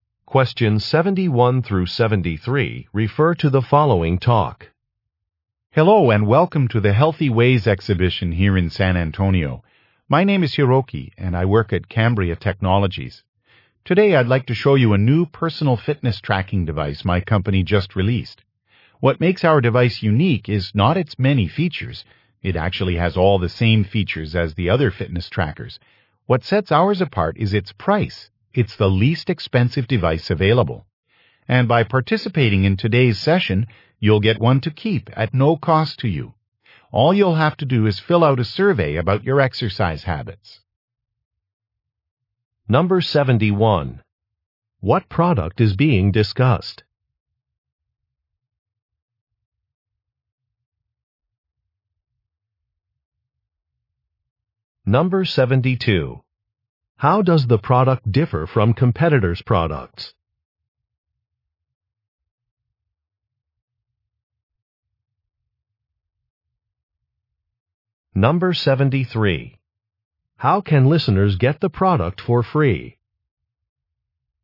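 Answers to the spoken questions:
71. A personal fitness tracking device
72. It is the least expensive
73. By filling out a survey about their exercise habits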